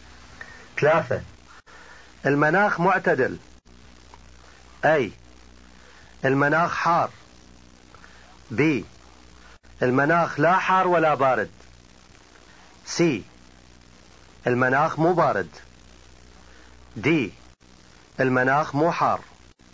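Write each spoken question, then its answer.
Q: المناخ معتدل.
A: B: المناخ لا حار ولا بارد.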